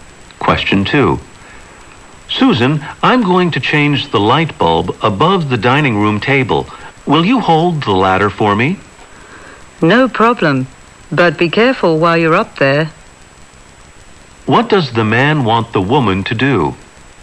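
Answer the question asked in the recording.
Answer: Hold the ladder for him.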